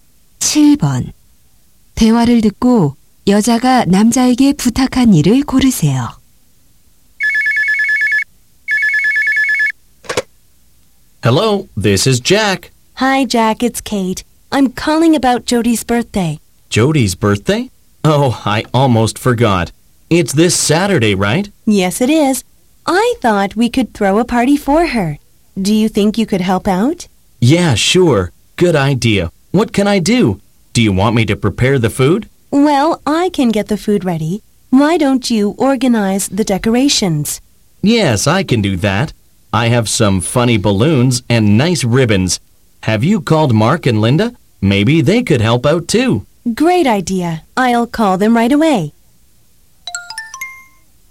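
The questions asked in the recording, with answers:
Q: 대화를 듣고 여자가 남자에게 부탁한 일을 고르세요.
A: 파티 장식 준비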